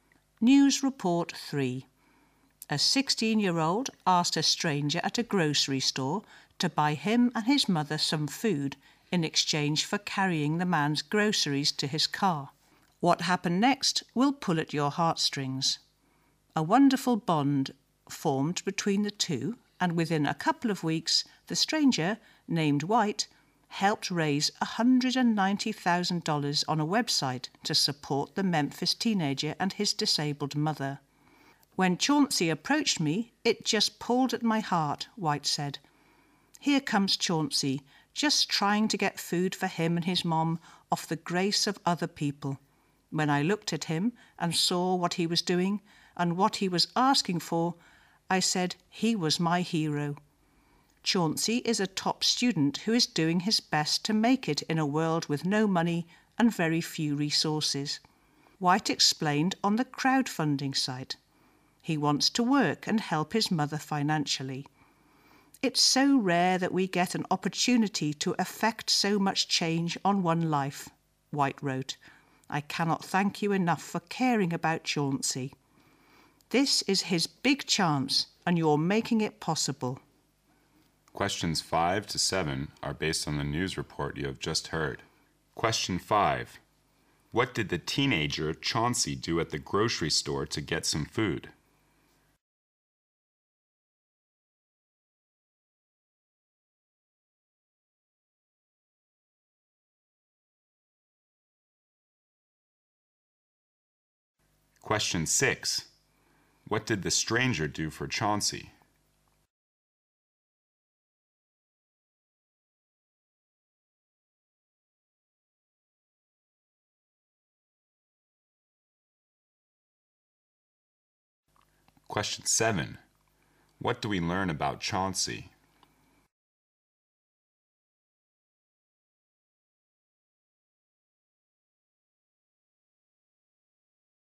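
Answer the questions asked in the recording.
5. He offered to carry a stranger's groceries to his car
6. He helped raise $190,000 online for him and his mother
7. He is a top student who wants to work and help his mother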